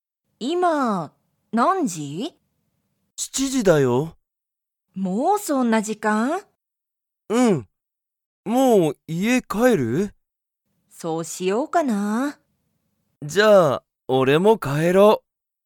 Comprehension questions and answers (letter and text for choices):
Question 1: ユウコは、家いえに帰かえりますか?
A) はい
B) いいえ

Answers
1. A) はい

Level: Level 1